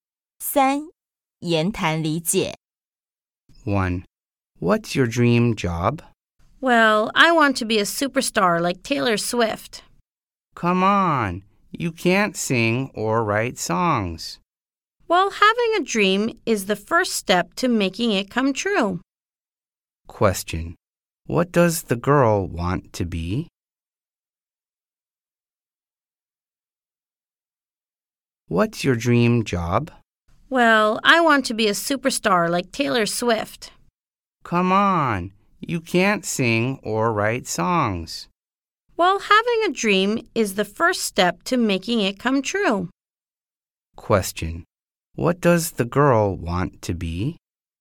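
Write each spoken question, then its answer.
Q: What does the girl want to be?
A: A superstar like Taylor Swift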